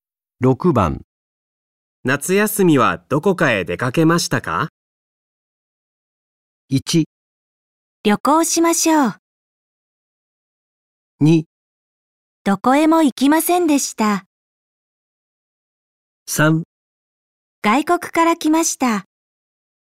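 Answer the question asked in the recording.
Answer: 2: どこへも行きませんでした。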